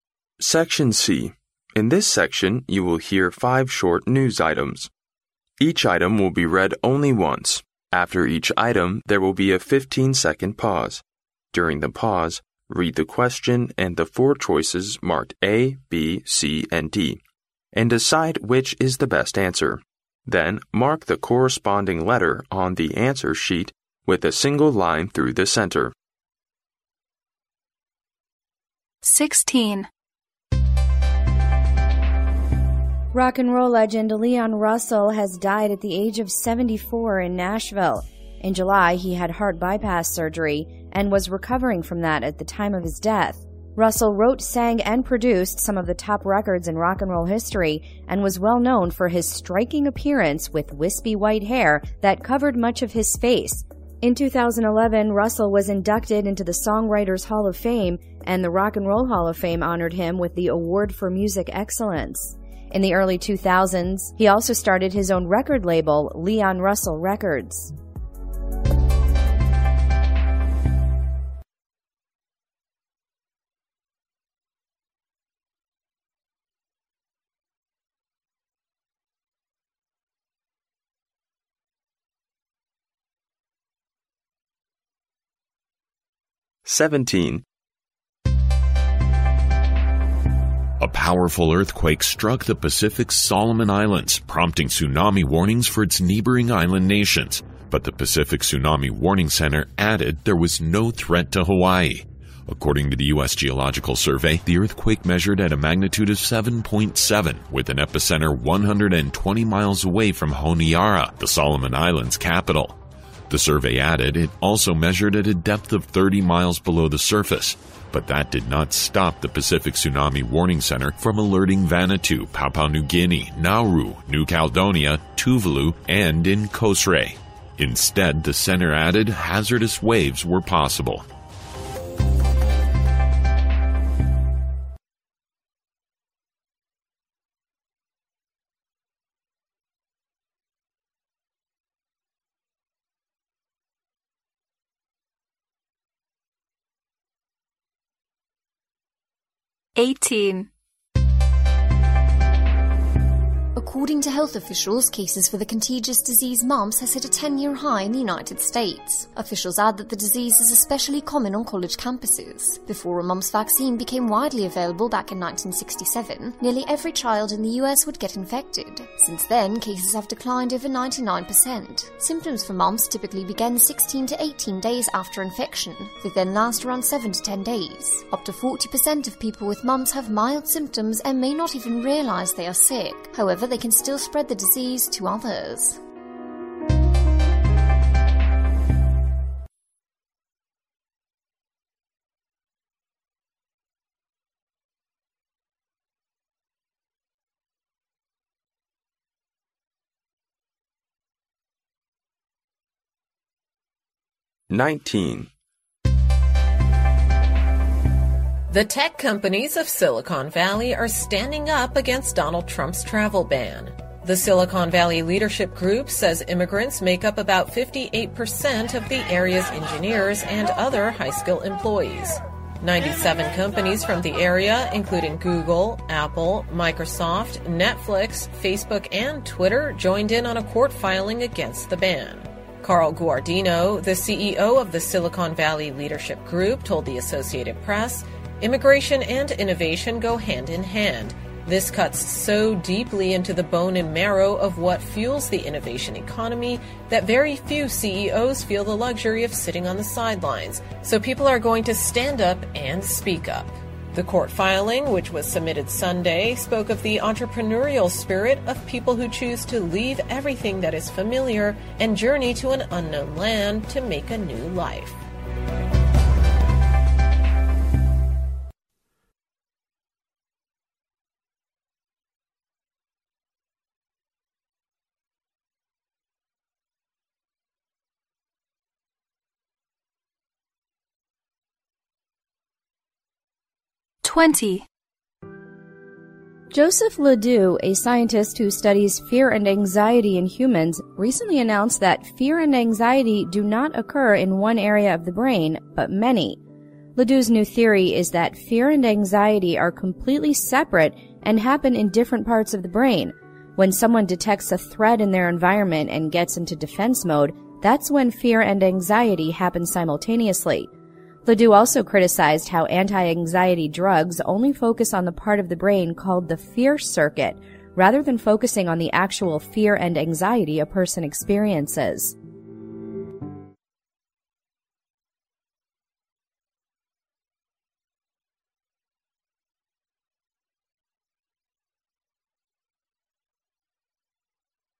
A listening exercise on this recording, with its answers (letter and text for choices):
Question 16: What is the news item about?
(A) A famous rock 'n' roll star.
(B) The history of rock 'n' roll.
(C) A well-known record label.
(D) The Songwriters Hall of Fame.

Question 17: What may the powerful earthquake cause?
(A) Epidemic.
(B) Flood.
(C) Fires.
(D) Tsunami.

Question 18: What do we learn from the news about mumps?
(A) Cases for the disease have reached the highest in 20 years.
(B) The disease first occurred in the year 1976.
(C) Its symptoms usually begin 16-18 days after infection.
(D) Over 50% of people infected with mumps have only mild symptoms.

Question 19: Why are the companies mentioned against the travel ban?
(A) Immigrants make up nearly 38% of their employees.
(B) The ban will make it hard for them to hire enough employees.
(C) Immigrants are an important source of innovation for them.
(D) The ban will prevent them from hiring cheaper labor.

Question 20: Why are anti-anxiety drugs criticized?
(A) They are useless to overcome anxiety.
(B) They neglect people's actual anxiety.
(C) They only have short-term effect.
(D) They have severe side effects.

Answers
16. (A) A famous rock 'n' roll star.
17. (D) Tsunami.
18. (C) Its symptoms usually begin 16-18 days after infection.
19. (C) Immigrants are an important source of innovation for them.
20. (B) They neglect people's actual anxiety.

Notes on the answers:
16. 新闻讲的是摇滚传奇人物Leon Russell的逝世、他的生平以及他在摇滚音乐上取得的成就。故A正确。
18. 新闻中说到Symptoms for mumps typically begin 16 to 18 days after infection,由此可知C项正确。由新闻首句中hit a 10-year high in the United States可知该病病例数达到十年内最高水平,故A错误。该疾病是从1967年开始发现的,而不是1976,故B错误。超过40%的病例有轻微症状,故D错误。
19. 新闻提到The Silicon Valley Leadership Group says immigrants make up about 58% of the area's engineers and other high-skill employees,硅谷领导集团说硅谷58%的工程师和有才能的职员都是移民。也提到Immigration and innovation go hand in hand,移民与创新是紧密联系的。因此可推断硅谷的企业反对禁令的原因是移民是硅谷创新力的重要来源。故C正确。
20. 新闻最后提到LeDoux also criticized how anti-anxiety...focusing on the actual fear and anxiety a person experiences,由此可知LeDoux反对抗忧虑药物的原因是这些药物只是用于治疗大脑的fear circuit这一部位,而忽略了人们内心真实的恐惧与忧虑。故B正确。

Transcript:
In this section, you will hear five short news items. Each item will be read only once. After each item, there will be a fifteen-second pause. During the pause, read the question and the four choices marked A, B, C and D, and decide which is the best answer. Then mark the corresponding letter on the answer sheet with a single line through the centre.
16 What is the news item about?
Rock 'n' roll legend Leon Russell has died at the age of 74 in Nashville. In July he had heart bypass surgery and was "recovering from that at the time of his death". Russell wrote, sang, and produced some of the top records in rock 'n' roll history and was well known for his "striking appearance", with "wispy white hair" that "covered much of his face". In 2011, Russell was indicted into the Songwriters Hall of Fame and the Rock and Roll Hall of Fame honored him with the Award for Music Excellence. In the early 2000s, he also started his own record label, Leon Russell Records.
17 What may the powerful earthquake cause?
A powerful earthquake struck the Pacific's Solomon Islands, prompting tsunami warnings for its neighboring island nations. But the Pacific Tsunami Warning Center added there was no threat to Hawaii. According to the U.S. Geological Survey, the earthquake measured at a magnitude of 7.7 with an epicenter 120 miles away from Honiara, the Solomon Island's capital. The survey added it also measured at a depth of 30 miles below the surface. But that did not stop the Pacific Tsunami Warning Center from alerting Vanuatu, Papua New Guinea, Nauru, New Caledonia, Tuvalu and in Kosrae. Instead, the center added hazardous waves were possible.
18 What do we learn from the news about mumps?
According to health officials, cases for the contagious disease mumps have hit a 10-year high in the United States. Officials add that the disease is especially common on college campuses. Before a mumps vaccine became widely available back in 1967, nearly every child in the U.S. would get infected. Since then, cases have declined over 99 percent. Symptoms for mumps typically begin 16 to 18 days after infection. They then last around 7 to 10 days. Up to 40 percent of people with mumps have mild symptoms and may not even realize they are sick. However, they can still spread the disease to others.
19 Why are the companies mentioned against the travel ban?
The tech companies of Silicon Valley are standing up against Donald Trump's travel ban. The Silicon Valley Leadership Group says immigrants make up about 58% of the area's engineers and other high-skill employees. 97 companies from the area, including Google, Apple, Microsoft, Netflix, Facebook and Twitter, joined in on a court filing against the ban. Carl Guardino, the CEO of the Silicon Valley Leadership Group told the Associated Press, "Immigration and innovation go hand in hand. This cuts so deeply into the bone and marrow of what fuels the innovation economy that very few CEOs feel the luxury of sitting on the sidelines. So people are going to stand up and speak up." The court filing, which was submitted Sunday, spoke of the entrepreneurial spirit of "people who choose to leave everything that is familiar and journey to an unknown land to make a new life".
20 Why are anti-anxiety drugs criticized?
Joseph LeDoux, a scientist who studies fear and anxiety in humans, recently announced that fear and anxiety do not occur in one area of the brain but many. LeDoux's new theory is that fear and anxiety are completely separate and happen in different parts of the brain. When someone detects a threat in their environment and gets into defense mode, that's when fear and anxiety happen simultaneously. LeDoux also criticized how anti-anxiety drugs only focus on the part of the brain called the "fear circuit", rather than focusing on the actual fear and anxiety a person experiences.
Section D (10 marks)